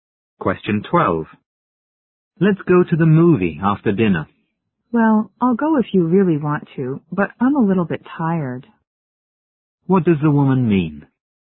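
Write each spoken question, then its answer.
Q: What does the woman mean?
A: She'd rather not go because she's tired, but will go if he really wants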